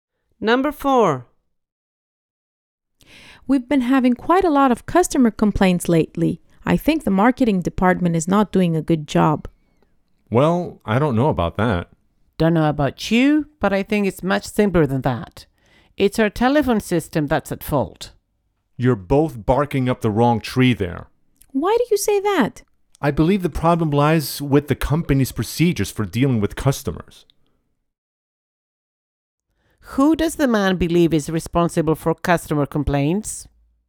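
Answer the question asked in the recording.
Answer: The company's procedures for dealing with customers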